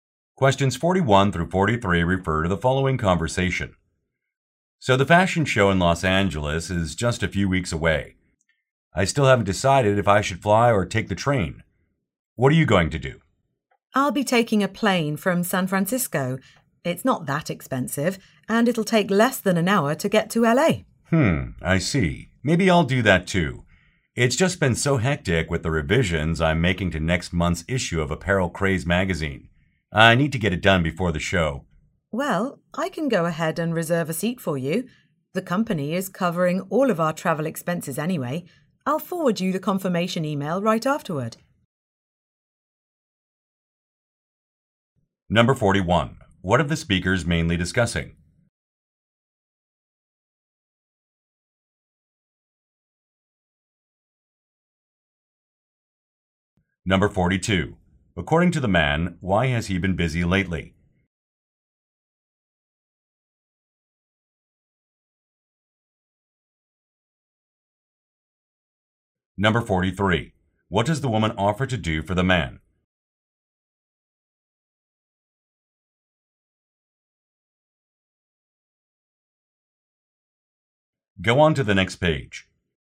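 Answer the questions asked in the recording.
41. How to travel to a fashion show in Los Angeles
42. He is revising next month's magazine issue
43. Reserve a plane seat for him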